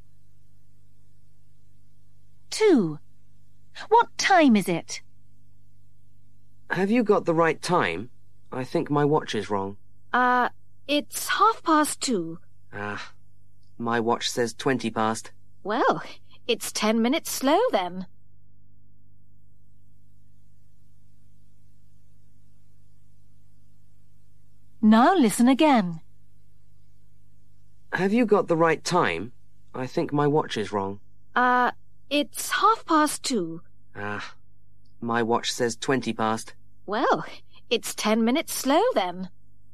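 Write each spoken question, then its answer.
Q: What time is it?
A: 2:30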